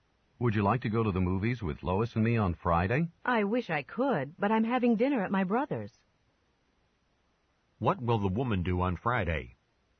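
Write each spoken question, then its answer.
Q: What will the woman do on Friday?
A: Have dinner at her brother's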